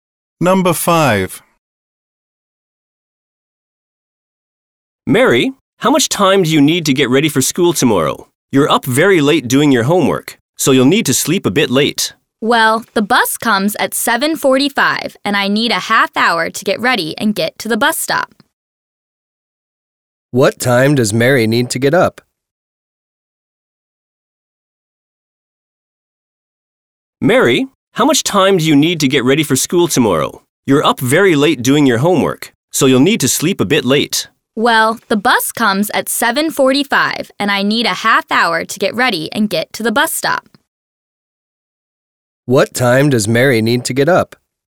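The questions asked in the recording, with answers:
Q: What time does Mary need to get up?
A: 7:15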